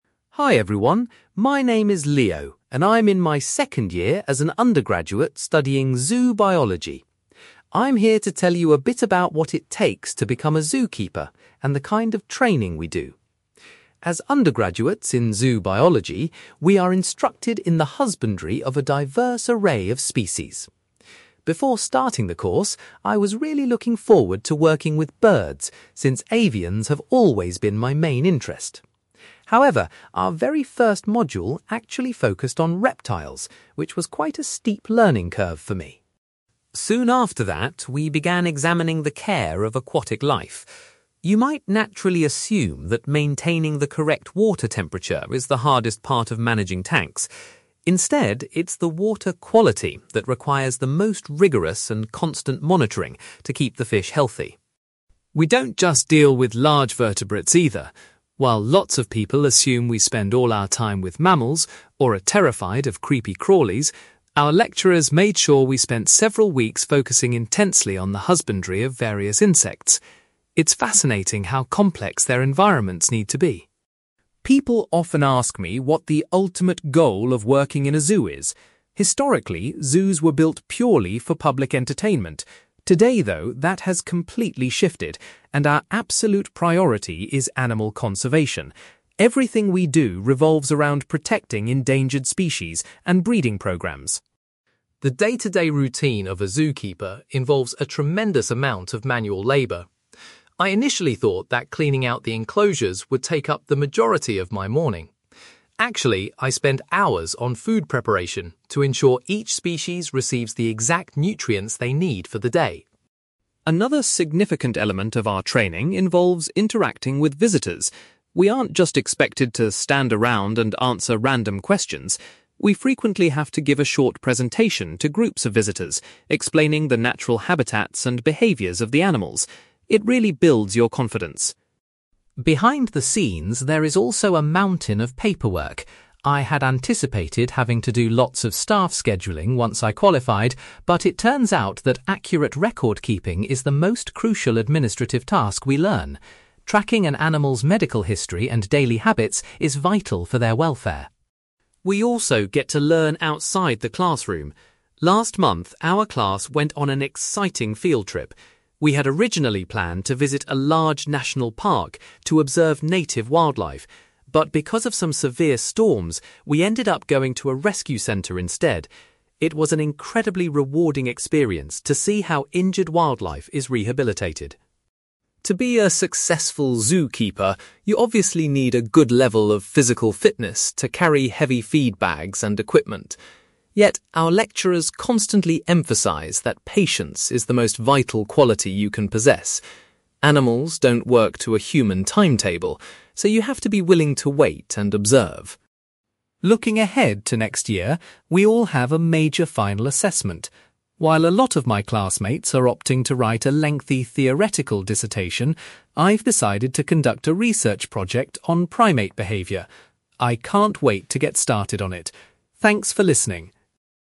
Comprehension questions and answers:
You will hear a student called Leo giving a presentation about his university course in zoo biology. For questions 9-18, complete the sentences with a word or short phrase.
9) Leo was surprised that his first university module concentrated on (9)........................... rather than birds.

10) When studying aquatic species, Leo discovered that monitoring the (10)........................... is the most demanding task.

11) Leo mentions that the class spent several weeks studying the care of (11)........................... .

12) Leo states that the primary focus of zoos nowadays is (12)........................... .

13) Leo explains that a significant part of his morning is dedicated to (13)........................... for the animals.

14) As part of their training to deal with the public, students must deliver a (14)........................... to guests.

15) Leo identifies (15)........................... as the most important administrative duty he has to practice.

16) Due to unforeseen circumstances, the students' recent field trip took place at a (16)........................... .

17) According to Leo's tutors, having (17)........................... is the most important characteristic for a zookeeper to possess.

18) For his final year assessment, Leo is planning to carry out a (18)........................... focusing on monkeys and apes.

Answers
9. reptiles
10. water quality
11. insects
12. animal conservation
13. food preparation
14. presentation
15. record keeping
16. rescue centre
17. patience
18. research project

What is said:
Leo: Hi everyone, my name is Leo, and I'm in my second year as an undergraduate studying zoo biology. I'm here to tell you a bit about what it takes to become a zookeeper and the kind of training we do. As undergraduates in zoo biology, we are instructed in the husbandry of a diverse array of species. Before starting the course, I was really looking forward to working with birds, since avians have always been my main interest. However, our very first module actually focused on reptiles, which was quite a steep learning curve for me!
Soon after that, we began examining the care of aquatic life. You might naturally assume that maintaining the correct water temperature is the hardest part of managing tanks. Instead, it's the water quality that requires the most rigorous and constant monitoring to keep the fish healthy.
We don't just deal with large vertebrates, either. While lots of people assume we spend all our time with mammals, or are terrified of creepy crawlies, our lecturers made sure we spent several weeks focusing intensely on the husbandry of various insects. It's fascinating how complex their environments need to be.
People often ask me what the ultimate goal of working in a zoo is. Historically, zoos were built purely for public entertainment. Today, though, that has completely shifted, and our absolute priority is animal conservation. Everything we do revolves around protecting endangered species and breeding programmes.
The day-to-day routine of a zookeeper involves a tremendous amount of manual labour. I initially thought that cleaning out the enclosures would take up the majority of my morning. Actually, I spend hours on food preparation to ensure each species receives the exact nutrients they need for the day.
Another significant element of our training involves interacting with visitors. We aren't just expected to stand around and answer random questions. We frequently have to give a short presentation to groups of visitors, explaining the natural habitats and behaviours of the animals. It really builds your confidence.
Behind the scenes, there is also a mountain of paperwork. I had anticipated having to do lots of staff scheduling once I qualified, but it turns out that accurate record keeping is the most crucial administrative task we learn. Tracking an animal's medical history and daily habits is vital for their welfare.
We also get to learn outside the classroom. Last month, our class went on an exciting field trip. We had originally planned to visit a large national park to observe native wildlife, but because of some severe storms, we ended up going to a rescue centre instead. It was an incredibly rewarding experience to see how injured wildlife is rehabilitated.
To be a successful zookeeper, you obviously need a good level of physical fitness to carry heavy feed bags and equipment. Yet, our lecturers constantly emphasize that patience is the most vital quality you can possess. Animals don't work to a human timetable, so you have to be willing to wait and observe.
Looking ahead to next year, we all have a major final assessment. While a lot of my classmates are opting to write a lengthy theoretical dissertation, I've decided to conduct a research project on primate behaviour. I can't wait to get started on it. Thanks for listening!

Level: B2